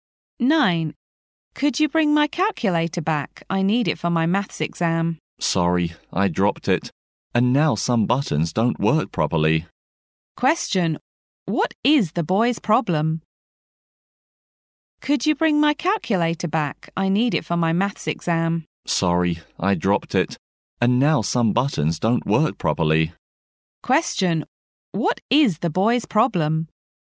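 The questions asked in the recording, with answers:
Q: What is the boy's problem?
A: He dropped the calculator and some buttons don't work properly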